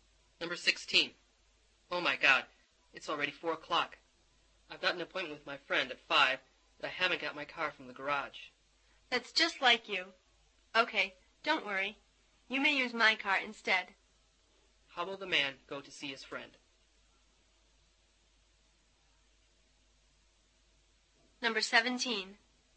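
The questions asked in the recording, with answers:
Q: How will the man go to see his friend?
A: In the woman's car.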